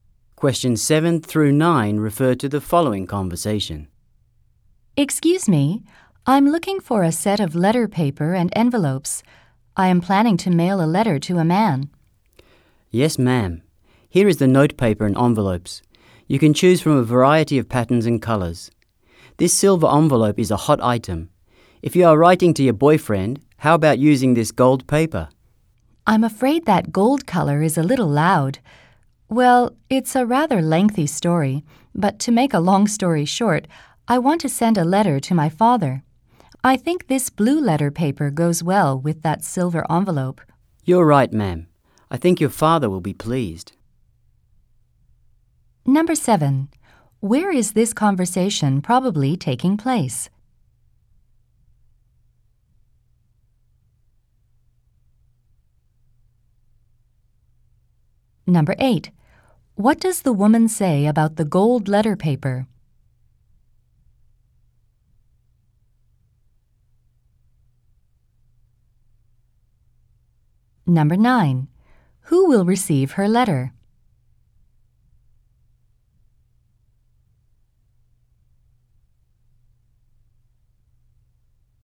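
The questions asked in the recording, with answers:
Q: Where is this conversation probably taking place?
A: At a stationery store

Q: What does the woman say about the gold letter paper?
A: Its colour is a little loud

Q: Who will receive her letter?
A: Her father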